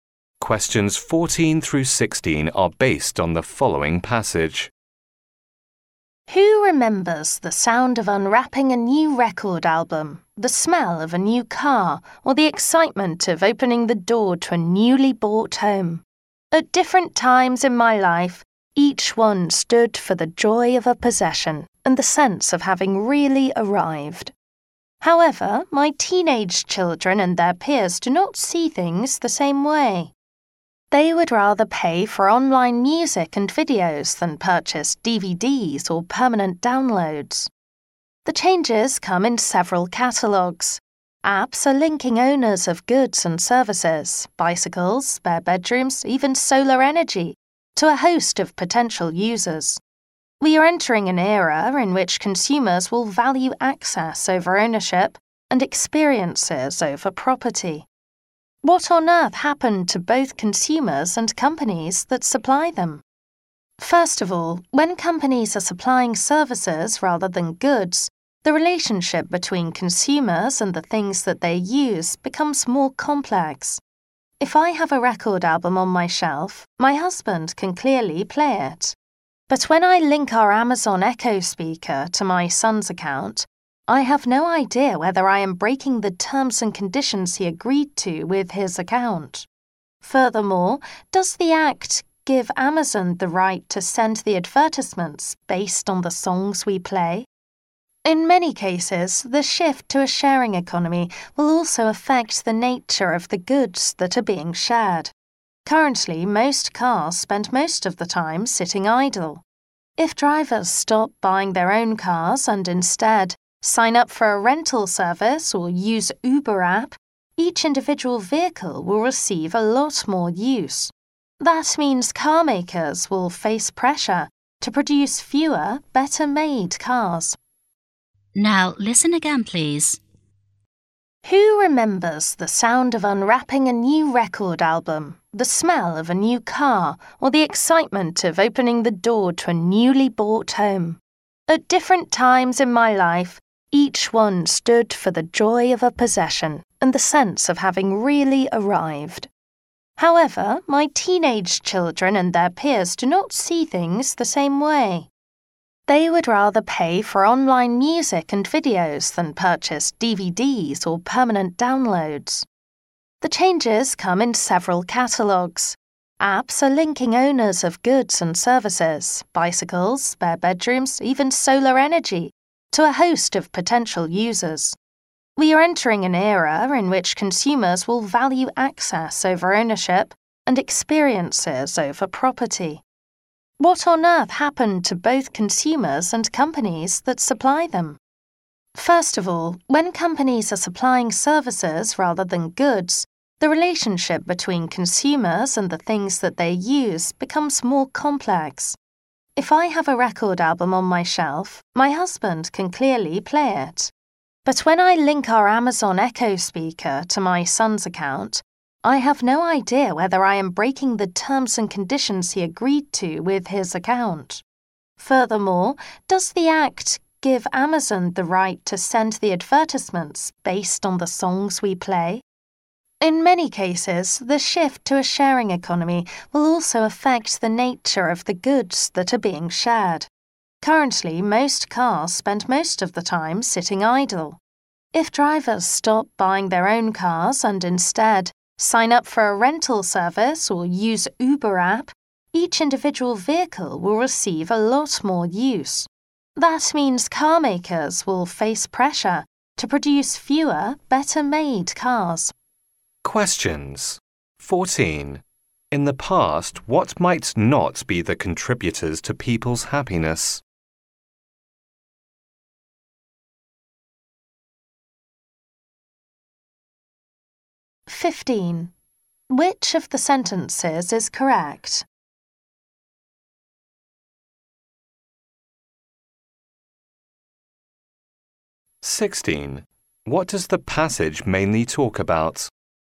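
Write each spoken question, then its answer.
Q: What does the passage mainly talk about?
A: The shift from ownership to access in a sharing economy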